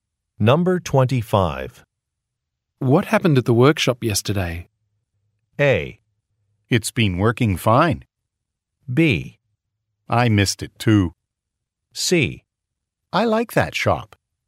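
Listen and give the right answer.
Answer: B: I missed it too.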